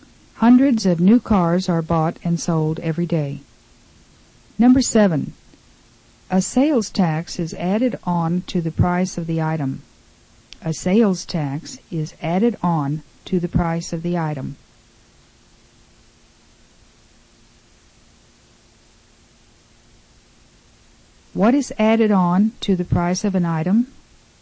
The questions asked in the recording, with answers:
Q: What is added on to the price of an item?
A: A sales tax is added on to the price of an item.